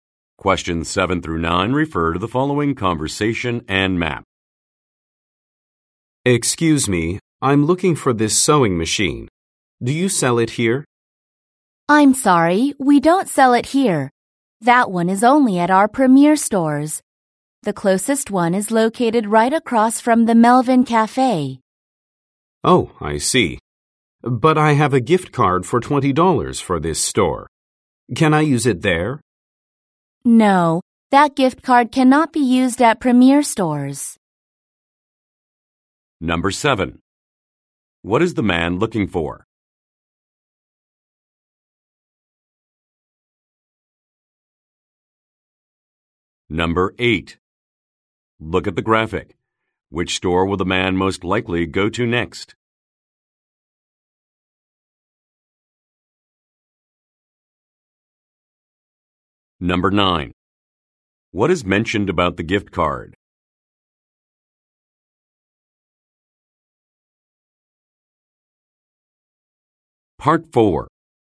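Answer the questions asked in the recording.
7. A sewing machine
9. It cannot be used at Premier stores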